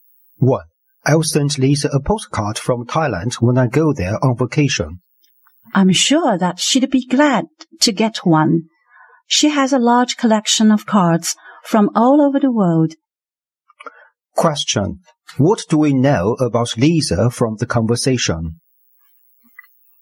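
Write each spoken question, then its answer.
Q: What do we know about Lisa from the conversation?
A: She collects postcards from all over the world.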